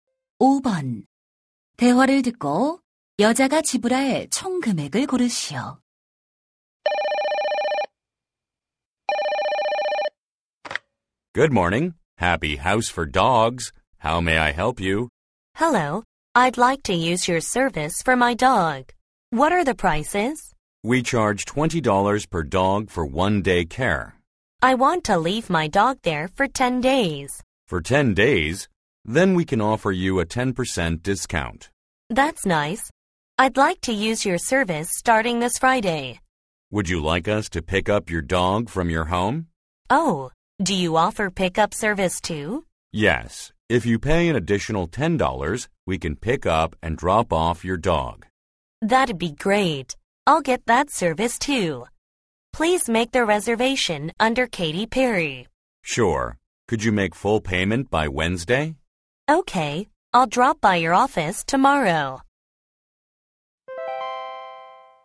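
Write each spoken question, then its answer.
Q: 대화를 듣고 여자가 지불할 총 금액을 고르시오.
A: 190달러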